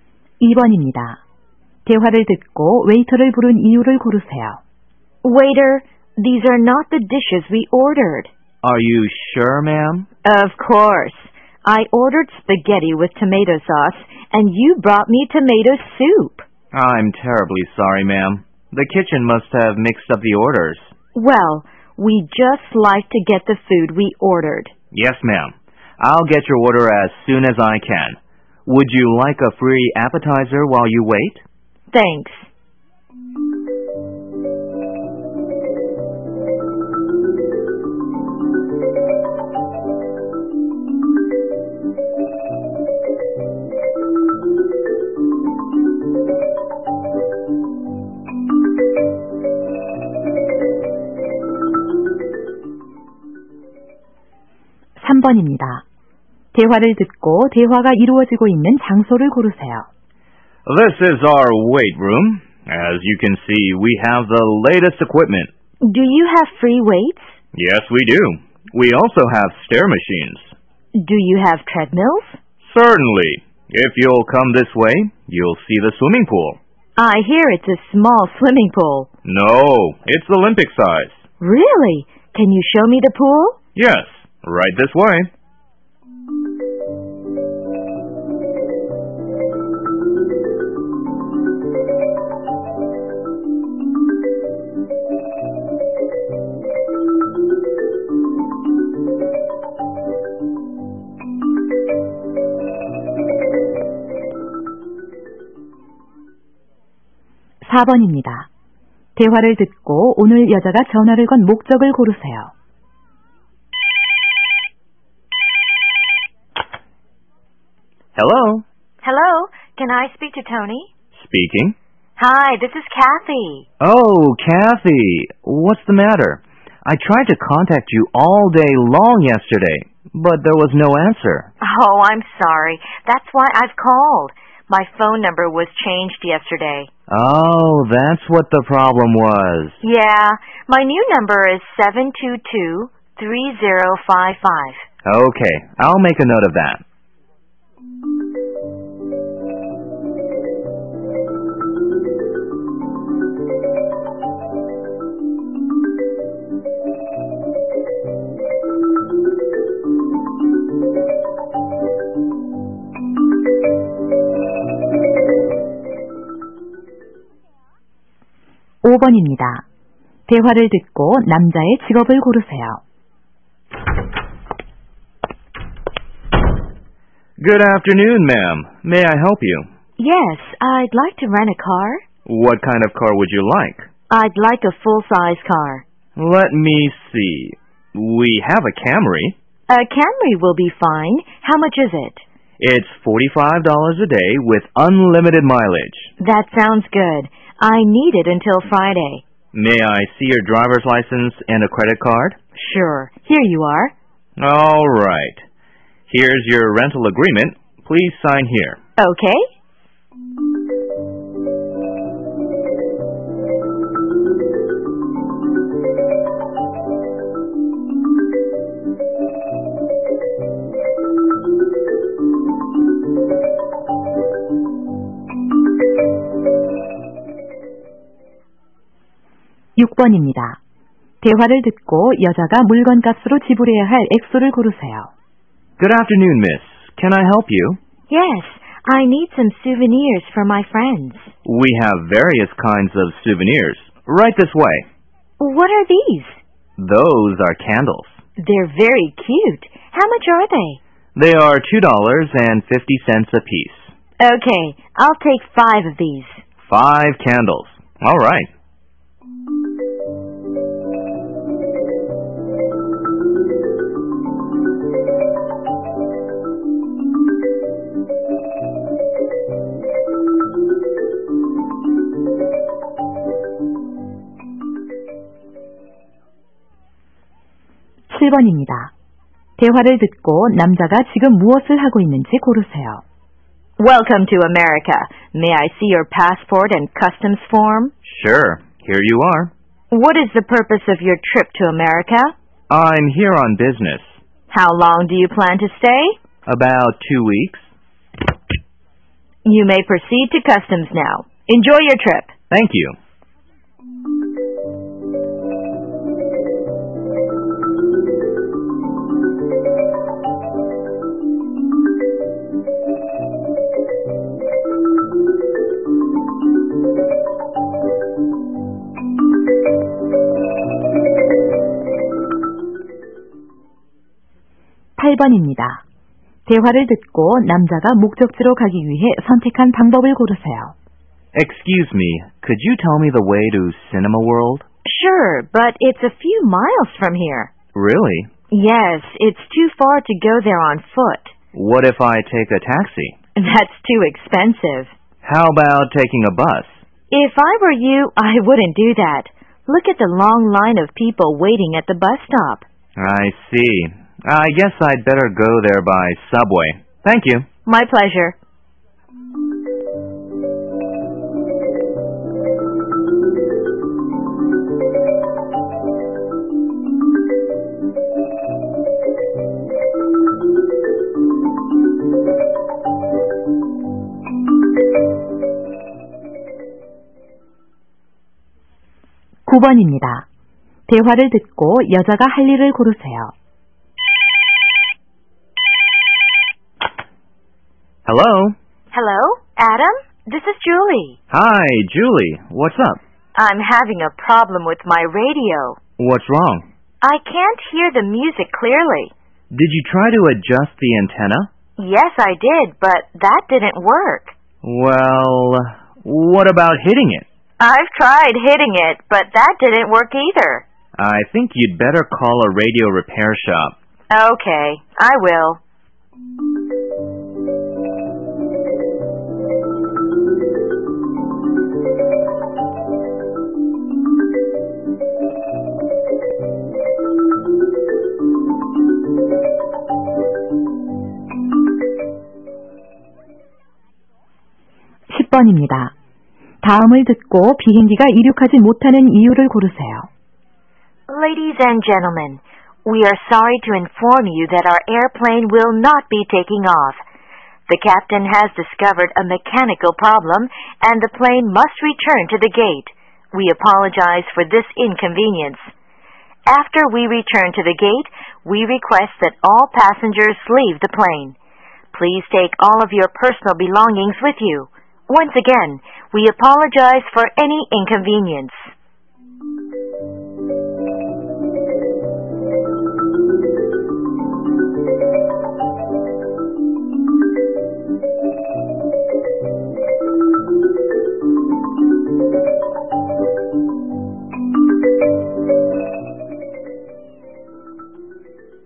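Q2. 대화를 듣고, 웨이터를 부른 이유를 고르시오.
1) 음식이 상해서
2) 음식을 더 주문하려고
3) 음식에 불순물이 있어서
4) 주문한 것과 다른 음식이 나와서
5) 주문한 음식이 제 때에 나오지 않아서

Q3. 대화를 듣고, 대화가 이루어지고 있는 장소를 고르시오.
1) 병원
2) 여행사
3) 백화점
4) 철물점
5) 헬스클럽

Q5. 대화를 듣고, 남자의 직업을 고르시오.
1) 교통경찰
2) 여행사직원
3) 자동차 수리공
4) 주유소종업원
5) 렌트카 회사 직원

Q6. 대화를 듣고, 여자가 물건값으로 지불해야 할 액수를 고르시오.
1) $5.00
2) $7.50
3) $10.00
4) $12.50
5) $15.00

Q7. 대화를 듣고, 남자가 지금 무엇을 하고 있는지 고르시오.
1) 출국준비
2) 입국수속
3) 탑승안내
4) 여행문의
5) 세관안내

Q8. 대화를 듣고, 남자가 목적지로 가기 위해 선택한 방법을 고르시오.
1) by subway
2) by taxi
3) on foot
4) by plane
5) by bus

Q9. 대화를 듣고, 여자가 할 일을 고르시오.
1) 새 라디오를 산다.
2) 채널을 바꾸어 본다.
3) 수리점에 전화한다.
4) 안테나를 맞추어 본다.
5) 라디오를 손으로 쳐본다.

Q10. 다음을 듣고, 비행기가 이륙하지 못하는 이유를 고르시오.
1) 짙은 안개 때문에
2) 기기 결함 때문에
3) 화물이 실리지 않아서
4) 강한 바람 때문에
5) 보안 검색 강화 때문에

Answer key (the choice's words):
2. 주문한 것과 다른 음식이 나와서
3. 헬스클럽
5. 렌트카 회사 직원
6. $12.50
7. 입국수속
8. by subway
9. 수리점에 전화한다.
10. 기기 결함 때문에

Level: 2003학년도 1회 2학년 듣기평가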